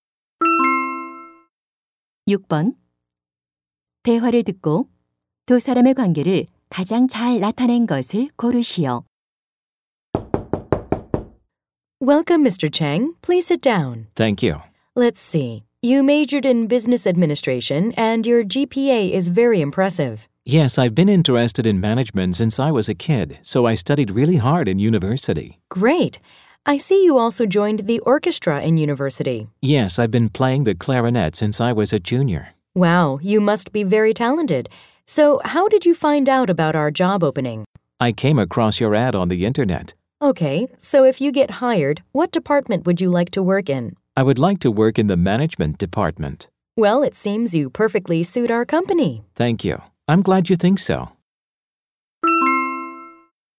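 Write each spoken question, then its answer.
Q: 대화를 듣고 두 사람의 관계를 가장 잘 나타낸 것을 고르시오.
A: 면접관 - 입사 지원자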